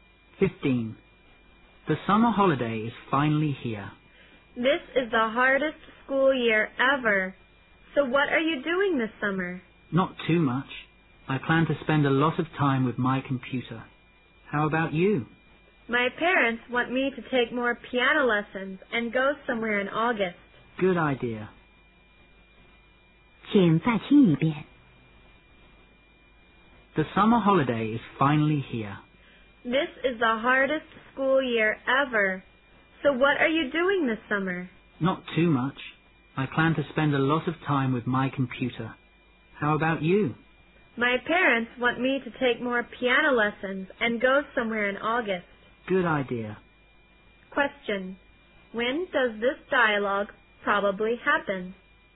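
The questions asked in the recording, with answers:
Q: When does this dialogue probably happen?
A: At the beginning of the summer holiday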